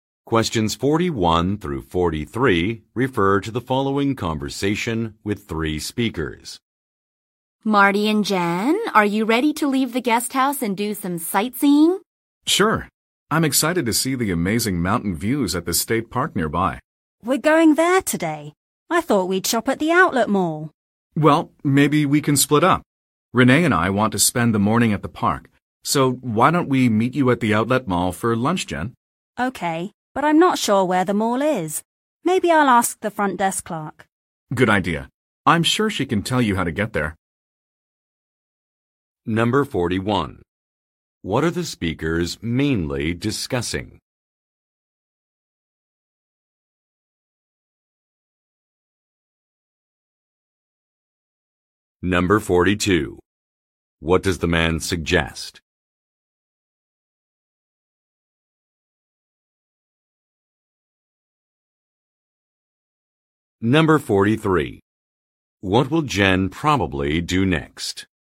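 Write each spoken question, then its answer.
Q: What are the speakers mainly discussing?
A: Their sightseeing plans for the day

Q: What does the man suggest?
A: Splitting up and meeting at the outlet mall for lunch

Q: What will Jen probably do next?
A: Ask the front desk clerk for directions to the mall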